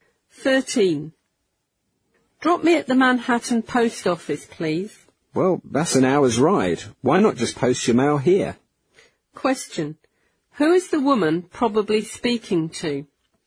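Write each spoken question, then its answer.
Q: Who is the woman probably speaking to?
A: A taxi driver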